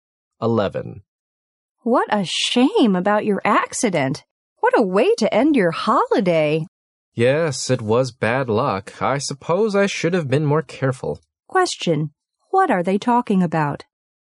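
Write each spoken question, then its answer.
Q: what are they talking about?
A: The man's accident, which ended his holiday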